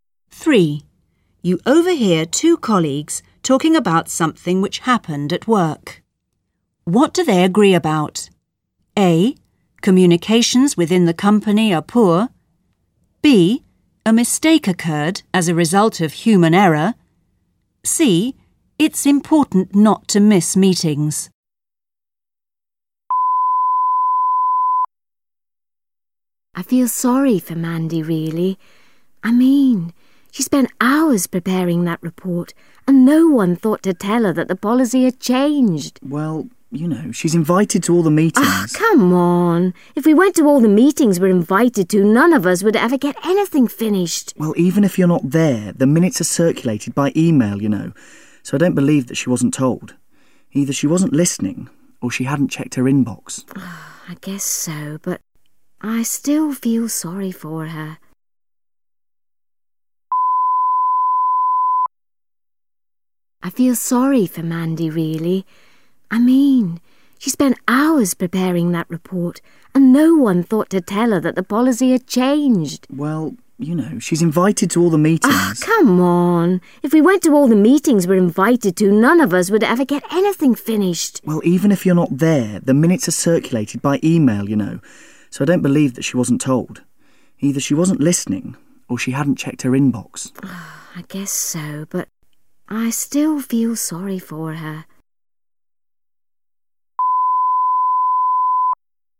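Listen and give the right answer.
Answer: B: A mistake occurred as a result of human error.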